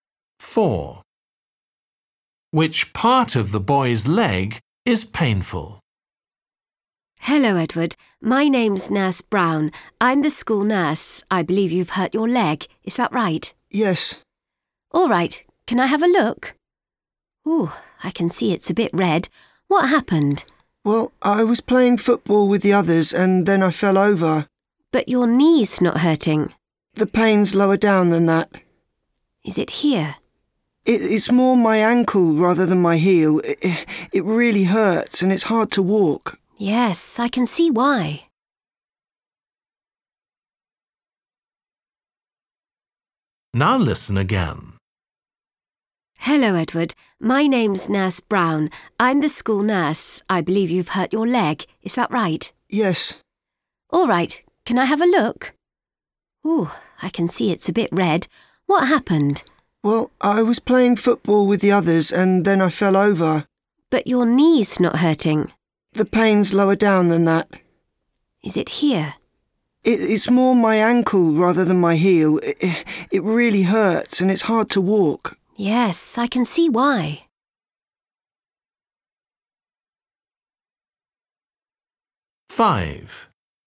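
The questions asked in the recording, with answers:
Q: Which part of the boy's leg is painful?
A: his ankle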